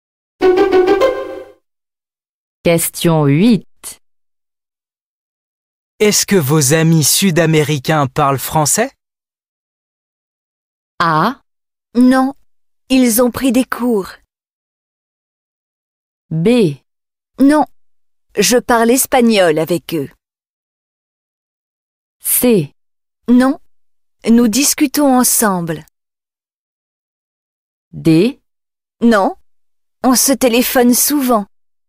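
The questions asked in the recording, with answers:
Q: Est-ce que vos amis sud-américains parlent français?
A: B: Non, je parle espagnol avec eux.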